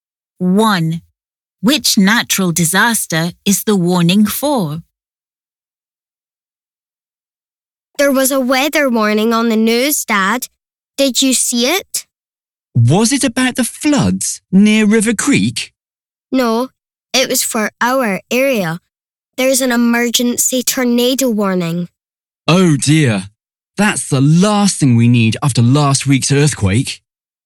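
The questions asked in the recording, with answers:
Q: Which natural disaster is the warning for?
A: a tornado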